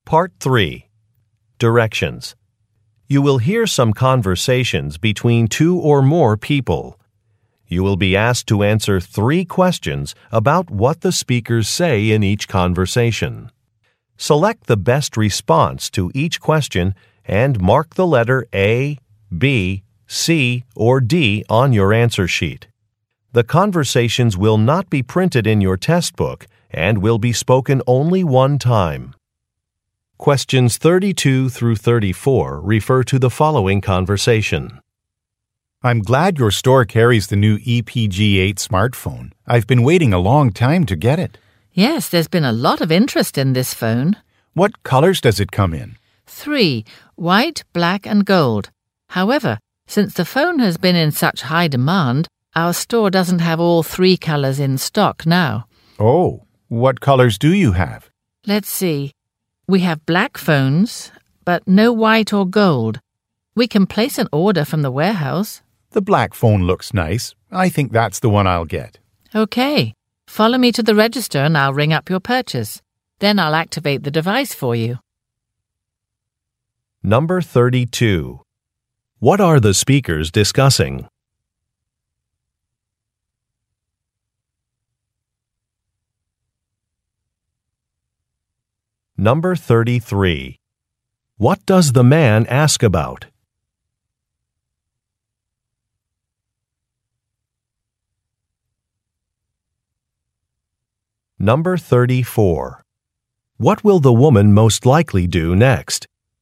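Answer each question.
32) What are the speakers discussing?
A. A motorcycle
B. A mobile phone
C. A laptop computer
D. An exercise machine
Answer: B

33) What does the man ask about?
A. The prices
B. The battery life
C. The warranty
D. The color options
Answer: D

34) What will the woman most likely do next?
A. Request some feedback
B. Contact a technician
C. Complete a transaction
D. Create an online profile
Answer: C

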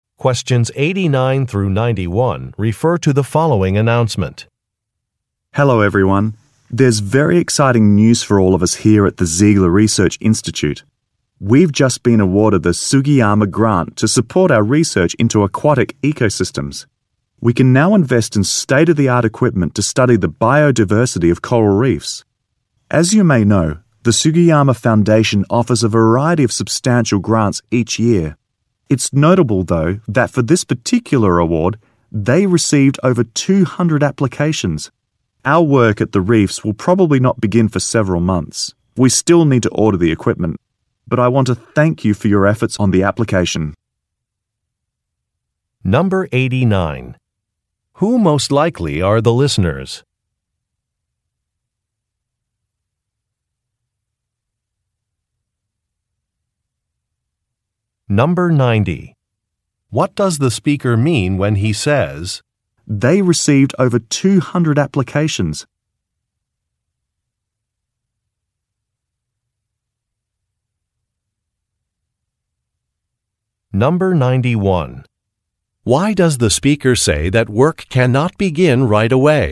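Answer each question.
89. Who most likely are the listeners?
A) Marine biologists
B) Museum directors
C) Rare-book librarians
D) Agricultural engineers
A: A

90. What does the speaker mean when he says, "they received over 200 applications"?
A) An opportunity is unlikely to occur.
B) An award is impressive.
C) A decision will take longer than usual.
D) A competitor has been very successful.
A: B

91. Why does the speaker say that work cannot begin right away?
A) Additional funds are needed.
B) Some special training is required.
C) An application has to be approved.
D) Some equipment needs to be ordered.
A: D

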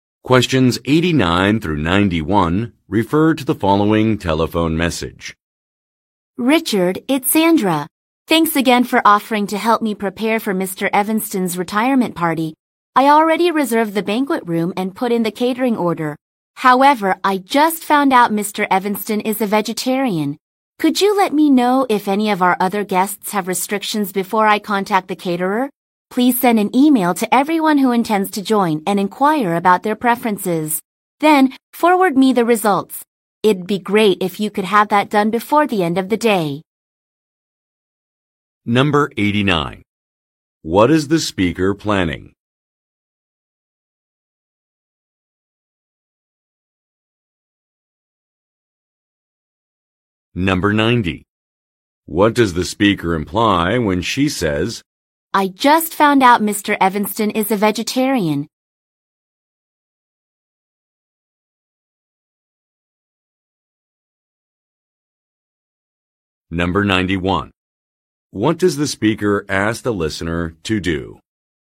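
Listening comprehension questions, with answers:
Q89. What is the speaker planning?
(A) An awards banquet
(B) A shareholder meeting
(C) A retirement gathering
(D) An employee orientation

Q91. What does the speaker ask the listener to do?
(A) Revise an invitation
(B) Research other venue options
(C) Bring some special dishes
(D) Contact guests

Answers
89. C
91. D

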